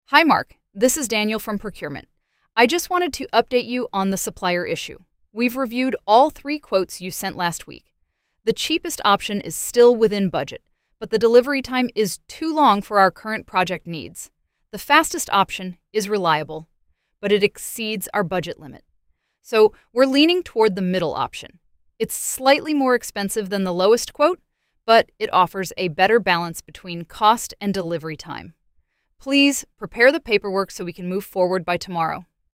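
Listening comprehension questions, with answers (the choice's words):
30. Which supplier option will they most likely choose?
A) The cheapest option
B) The fastest option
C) The middle option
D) They will not choose any option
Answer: The middle option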